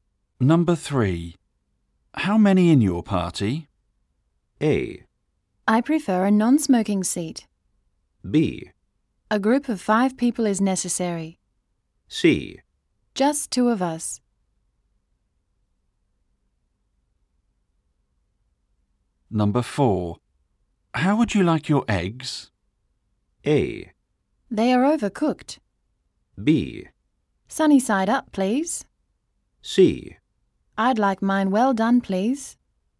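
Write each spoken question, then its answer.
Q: How many in your party?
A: C: Just 2 of us.

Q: How would you like your eggs?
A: B: Sunny side up, please.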